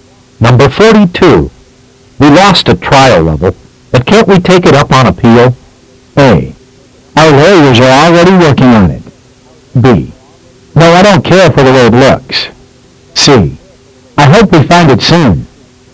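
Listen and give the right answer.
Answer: A: Our lawyers are already working on it.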